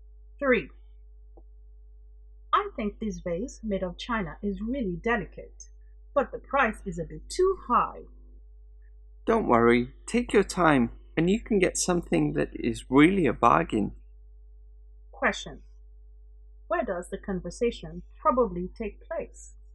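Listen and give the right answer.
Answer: In a shop selling china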